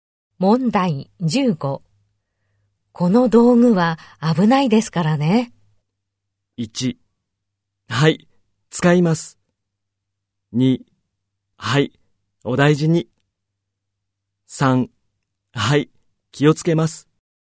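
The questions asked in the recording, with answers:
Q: この道具は危ないですからね。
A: 3: はい、気をつけます。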